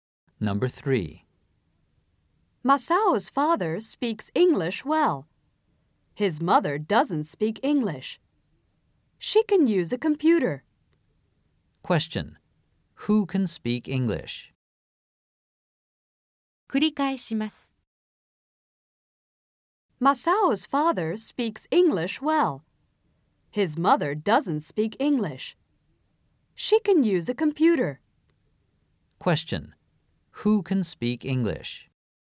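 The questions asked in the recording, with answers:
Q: Who can speak English?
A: Masao's father can.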